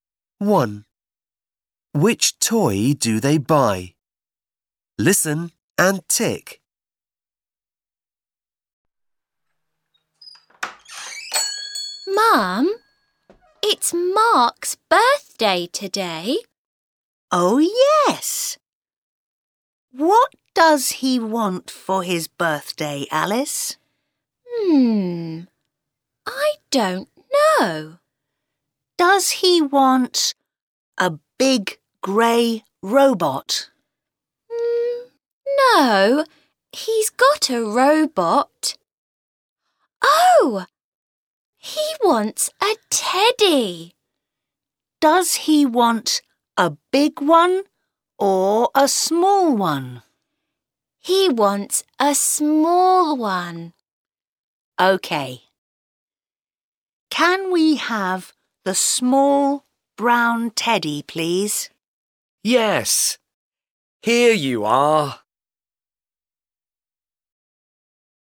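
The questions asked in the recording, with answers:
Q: Which toy do they buy?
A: the small brown teddy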